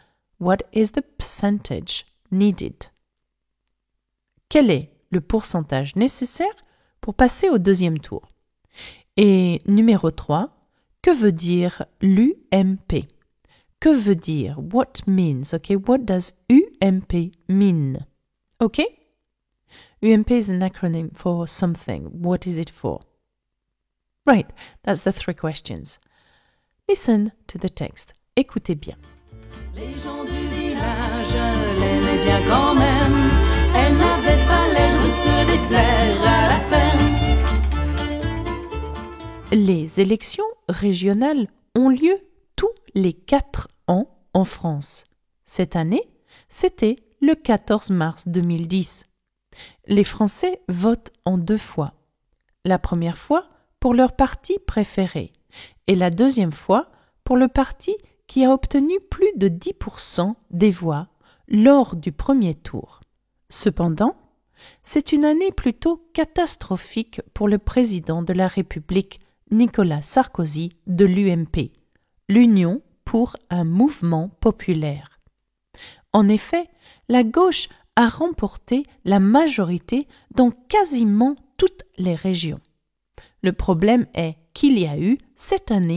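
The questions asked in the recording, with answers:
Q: Quel est le pourcentage nécessaire pour passer au deuxième tour?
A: plus de 10% des voix

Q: que veut dire l'UMP?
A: l'Union pour un mouvement populaire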